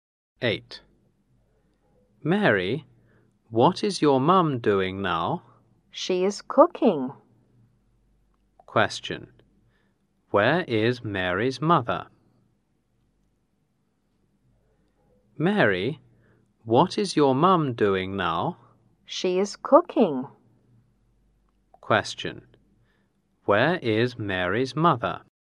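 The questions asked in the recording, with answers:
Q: Where is Mary's mother?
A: In the kitchen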